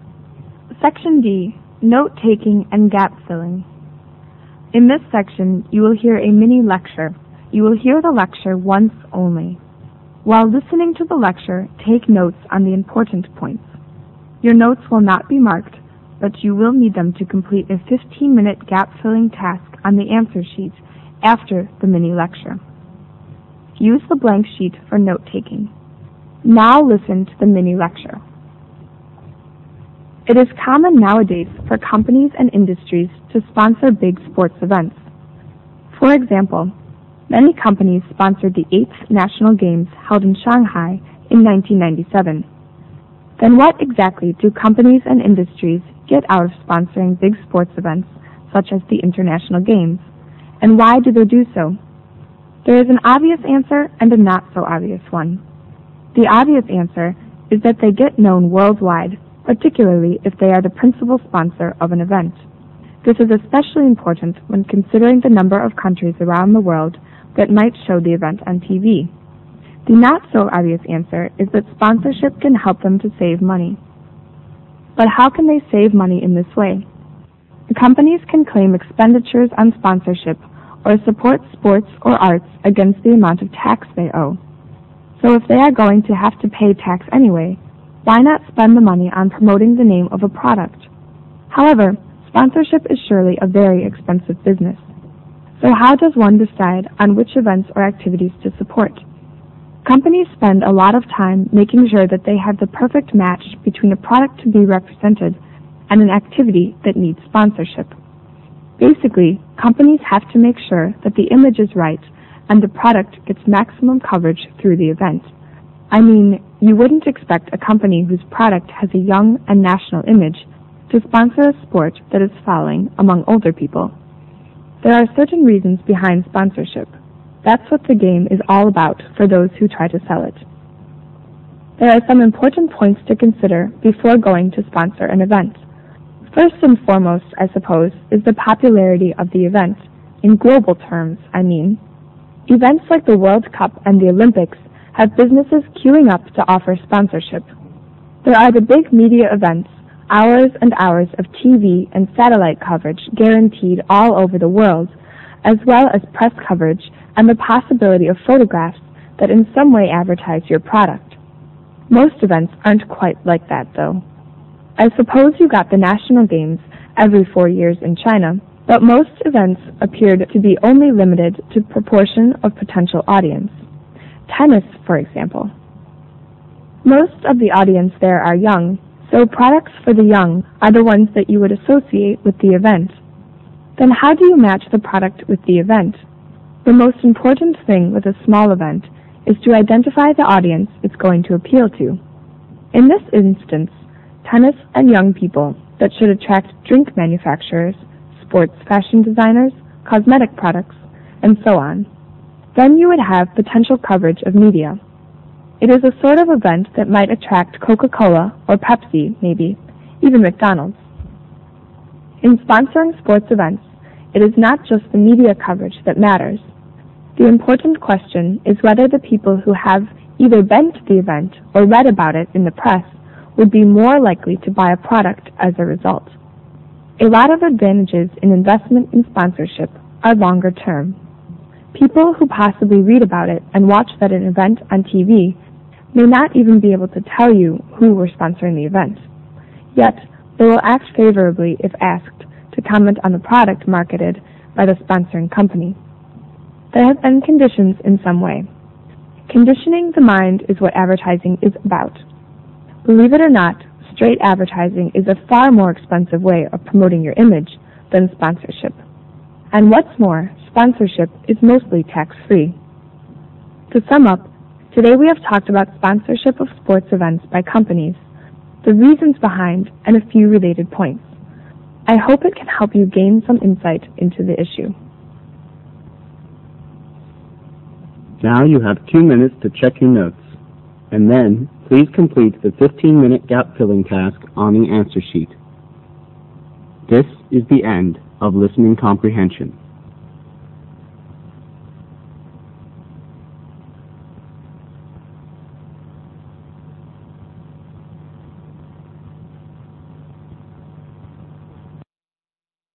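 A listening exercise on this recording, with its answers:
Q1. The first reason is that they get (1)______ throughout the world.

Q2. The second reason is that companies and industries (2)______money, as they get reductions in the tax they owe if they sponsor sports or arts activities.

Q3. As sponsorship is (3)______, careful thinking is required in deciding which events to sponsor.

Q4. It is important that the event to be sponsored (4)______ the product(s) to be promoted.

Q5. That is, the right (5)______ and maximum product coverage must be guaranteed in the event.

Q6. International sports events are big (6)______ events, which get extensive coverage on TV and in the press.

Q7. The right audience would attract manufacturers of other related products like (7)______ , etc.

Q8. People are expected to respond (8)______ to the products promoted.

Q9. Advertising is (9)______the mind.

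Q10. Sponsorship is better than straight advertising: a) less (10) ___ ___ ; b) tax-free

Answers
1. known
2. save
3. expensive
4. matches
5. image
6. media
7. drinks, sports fashion, cosmetics
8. favorably
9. conditioning
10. expensive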